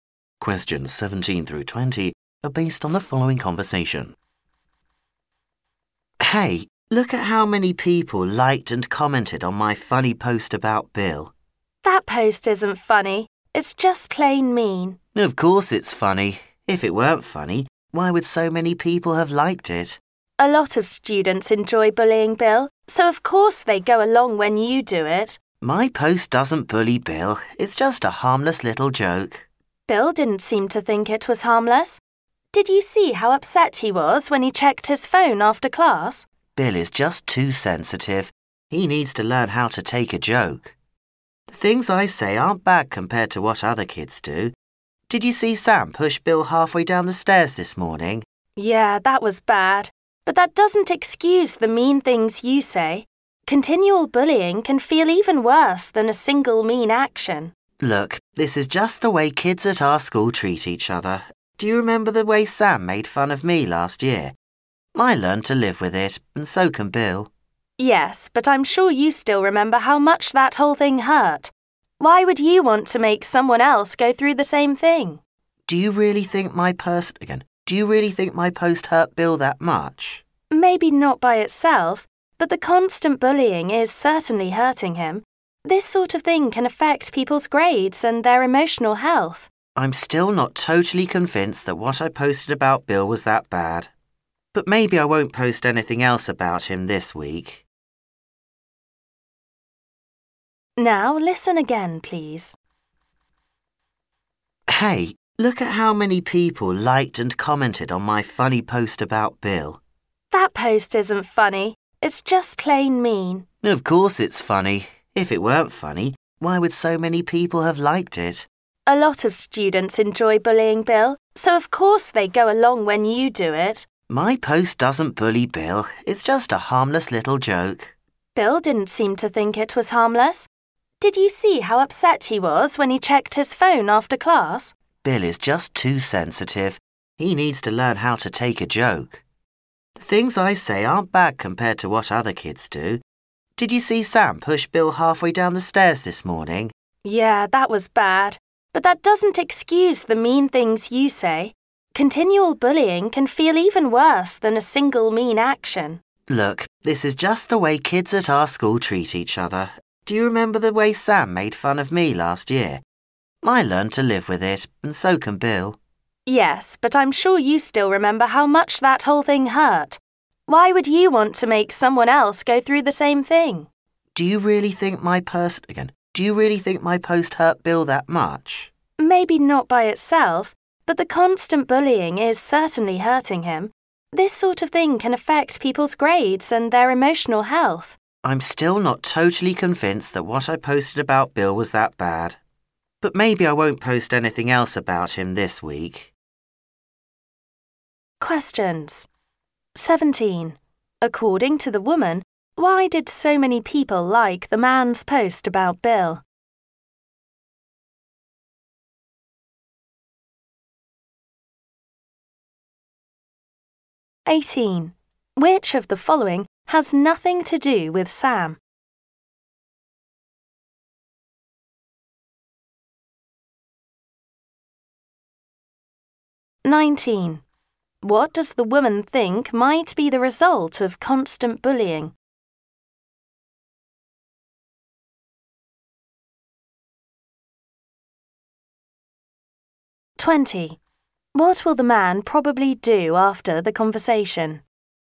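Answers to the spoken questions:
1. Many students enjoy bullying Bill
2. It can affect people's grades and emotional health
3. Stop posting about Bill, at least this week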